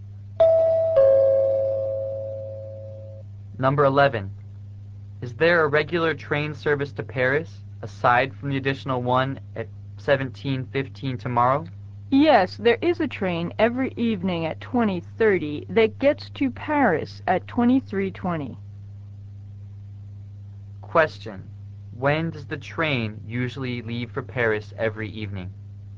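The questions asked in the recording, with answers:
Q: When does the train usually leave for Paris every evening?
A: At 20:30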